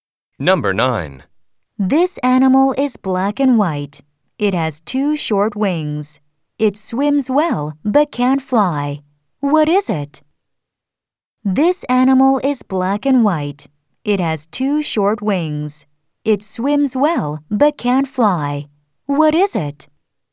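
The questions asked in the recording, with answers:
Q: What is it?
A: a penguin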